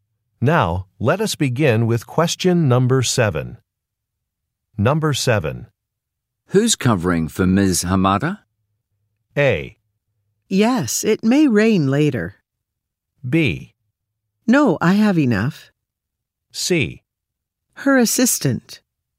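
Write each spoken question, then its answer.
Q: Who's covering for Ms. Hamada?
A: C: Her assistant.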